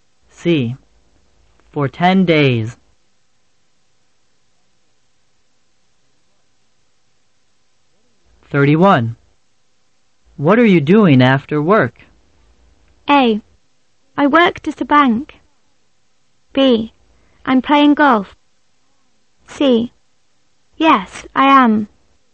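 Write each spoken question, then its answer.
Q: What are you doing after work?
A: B: I'm playing golf.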